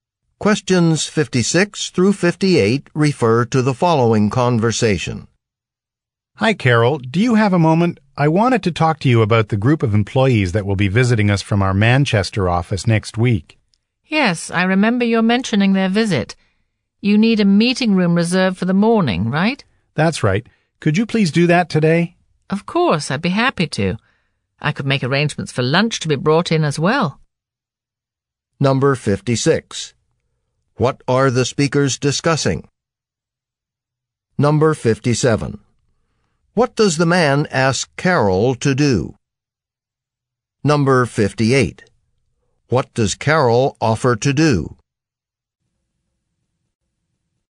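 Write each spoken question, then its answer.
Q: What are the speakers discussing?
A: A visit from employees of the Manchester office

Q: What does the man ask Carol to do?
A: Reserve a meeting room

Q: What does Carol offer to do?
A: Arrange for lunch to be brought in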